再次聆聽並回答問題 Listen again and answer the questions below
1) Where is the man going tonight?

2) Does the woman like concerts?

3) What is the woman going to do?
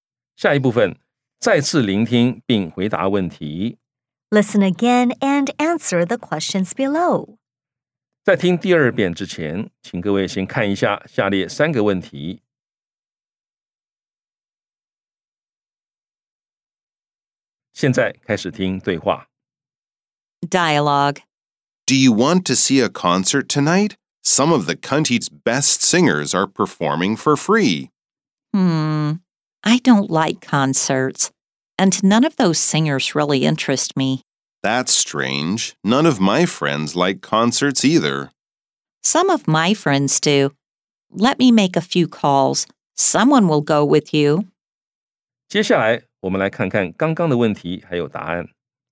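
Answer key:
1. He is going to see a concert.
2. No, she doesn't like concerts.
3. She is going to make a few calls.

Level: 中階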